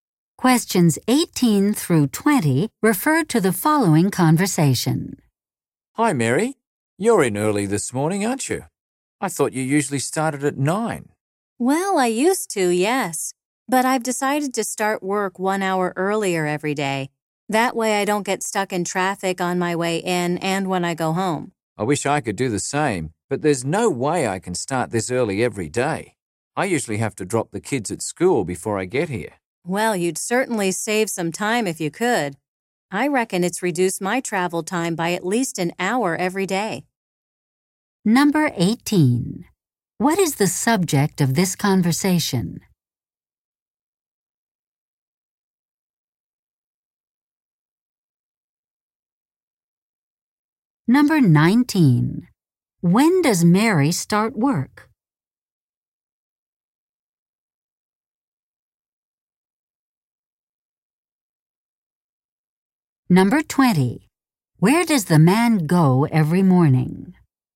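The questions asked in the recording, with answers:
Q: When does Mary start work?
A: At 8 o'clock, one hour earlier

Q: Where does the man go every morning?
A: To his children's school to drop off the kids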